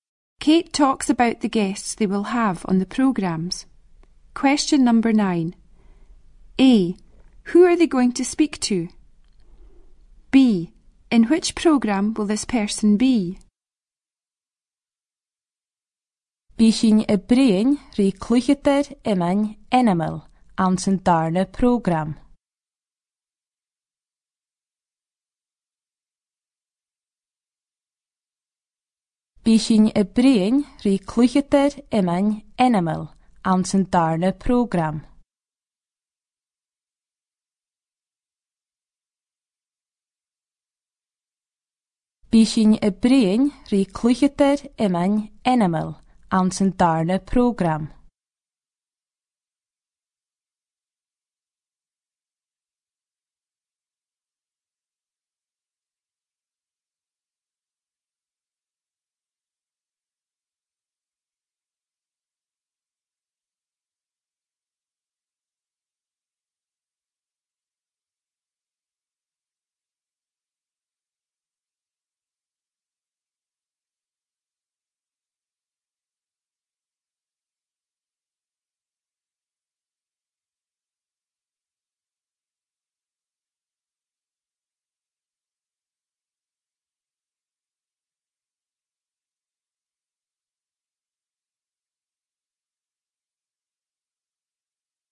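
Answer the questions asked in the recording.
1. A famous shinty player
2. The second programme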